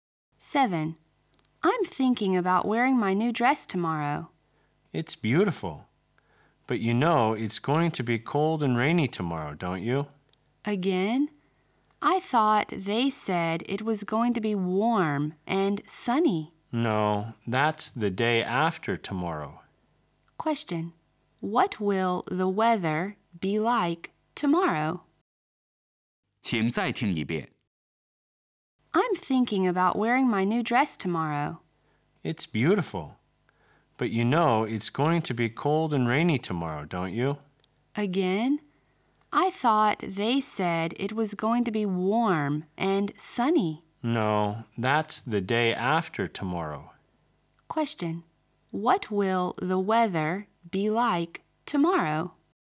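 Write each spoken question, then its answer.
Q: What will the weather be like tomorrow?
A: Cold and rainy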